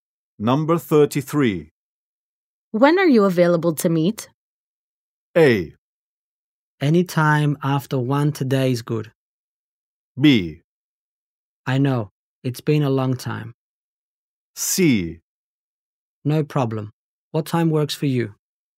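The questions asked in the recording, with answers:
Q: When are you available to meet?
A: A: Anytime after one today is good.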